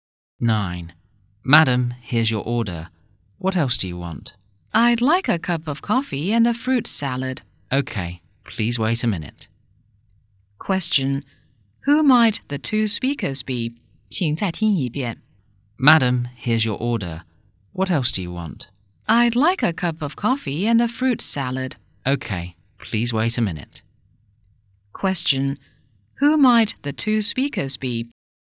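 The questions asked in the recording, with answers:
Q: Question, who might the two speakers be?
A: A waiter and a customer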